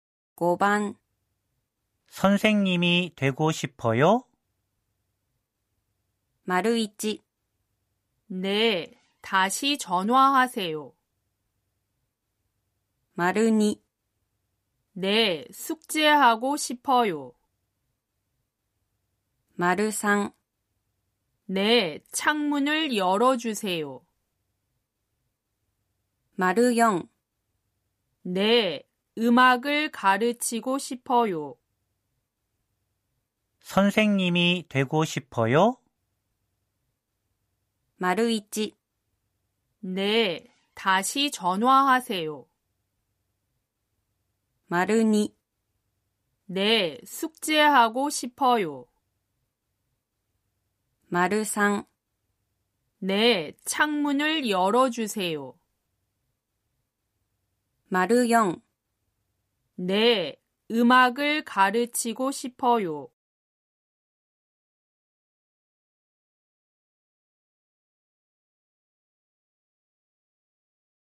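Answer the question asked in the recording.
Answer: 4: 네,음악을가르치고싶어요.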